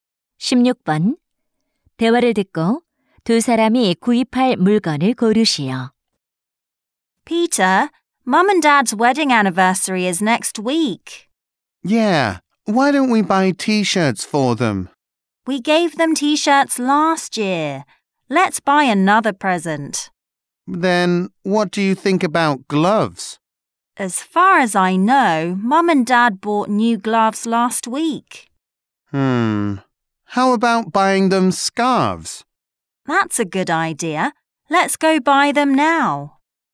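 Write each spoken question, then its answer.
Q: 대화를 듣고 두 사람이 구입할 물건을 고르시오.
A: 스카프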